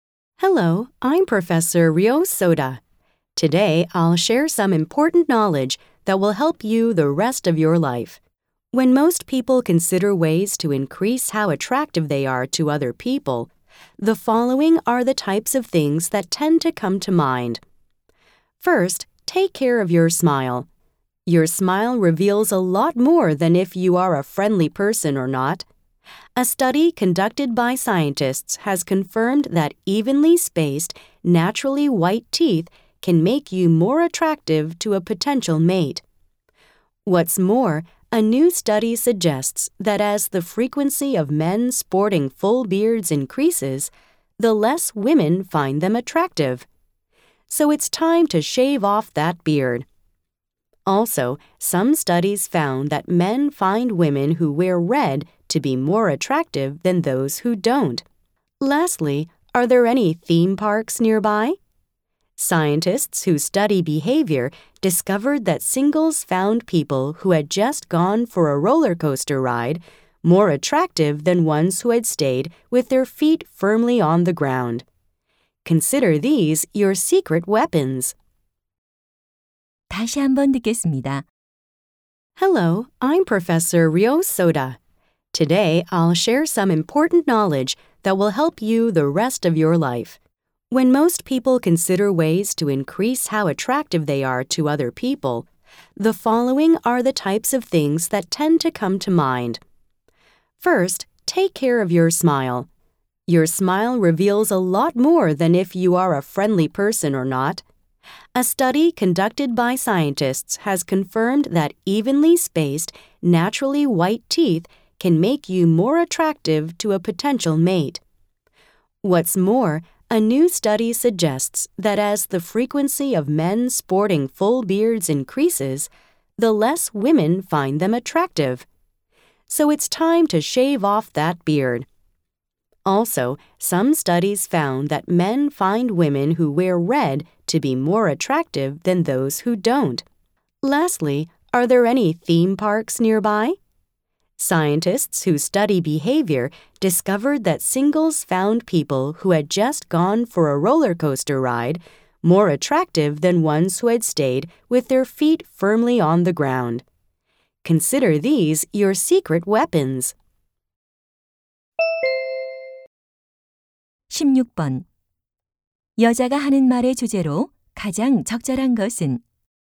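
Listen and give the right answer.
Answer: 다른 사람에게 더 매력적으로 보이는 방법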